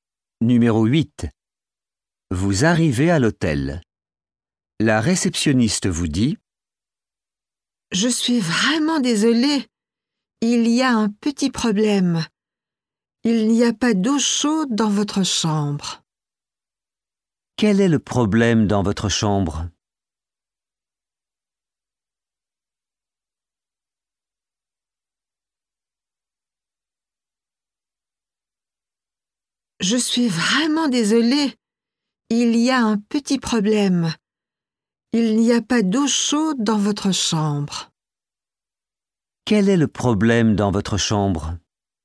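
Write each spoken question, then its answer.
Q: Quel est le problème dans votre chambre?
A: Il n'y a pas d'eau chaude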